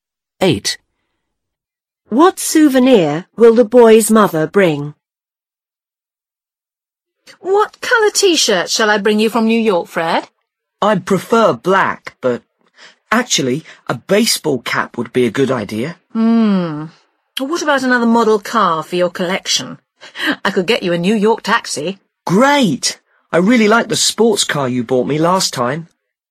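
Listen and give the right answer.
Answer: a model New York taxi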